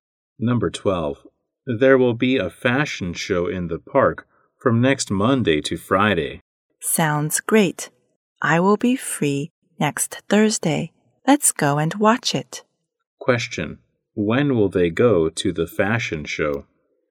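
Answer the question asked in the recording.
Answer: Next Thursday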